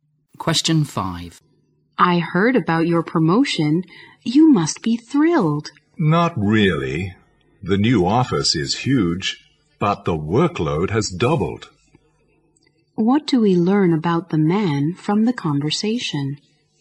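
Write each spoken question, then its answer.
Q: What do we learn about the man from the conversation?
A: He isn't happy with his promotion because his workload has doubled.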